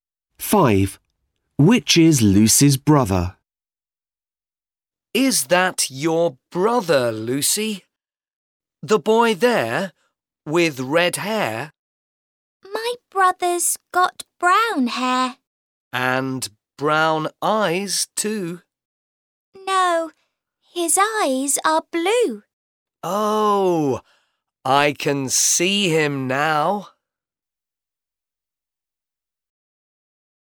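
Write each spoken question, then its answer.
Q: Which is Lucy's brother?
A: The boy with brown hair and blue eyes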